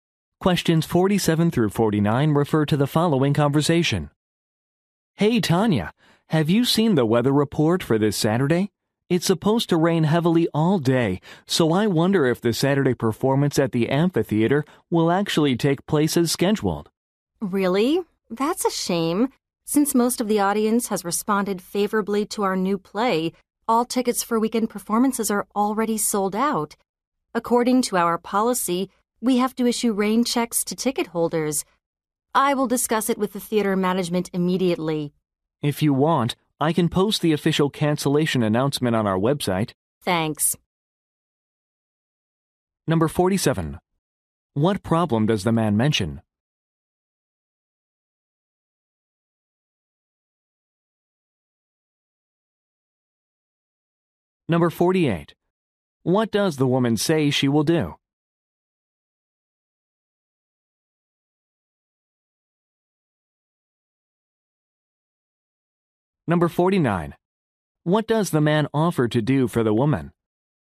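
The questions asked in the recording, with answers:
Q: What problem does the man mention?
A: Heavy rain is forecast for the Saturday performance

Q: What does the woman say she will do?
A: Talk with the theater management

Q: What does the man offer to do for the woman?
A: Post a cancellation announcement on the website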